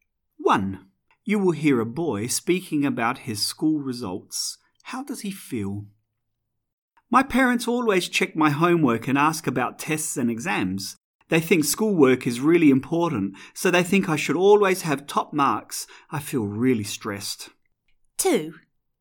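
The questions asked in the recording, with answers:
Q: How does he feel?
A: Stressed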